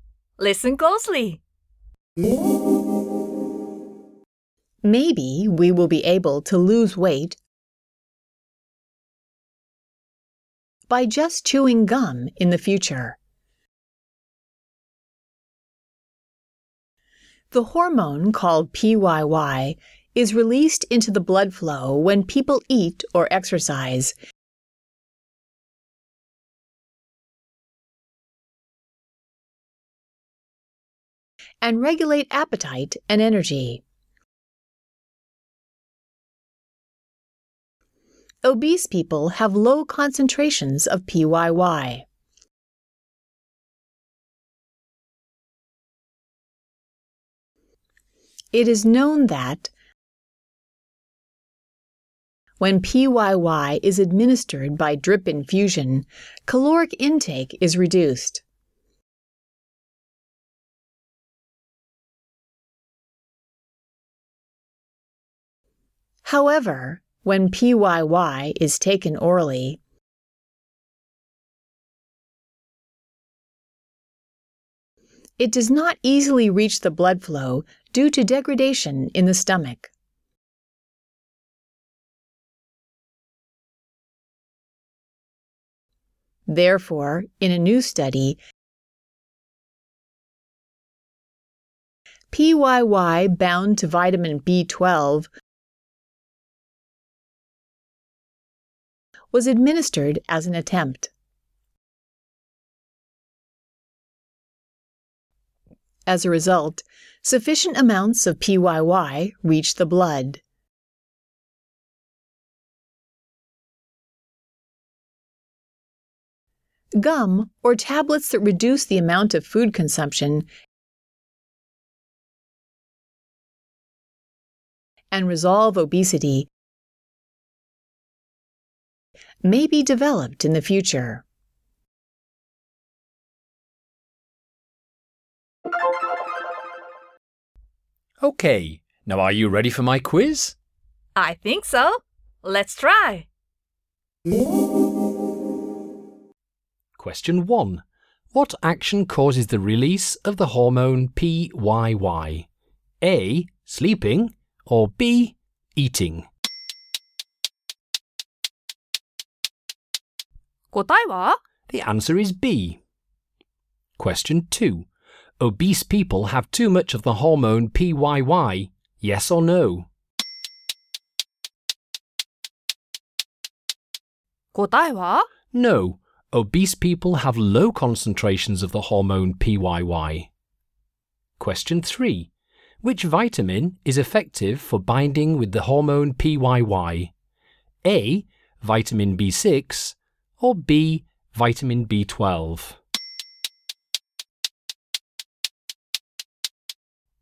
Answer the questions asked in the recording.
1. The answer is B.
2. No. Obese people have low concentrations of the hormone PYY.
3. Vitamin B12 is the most effective for binding with PYY.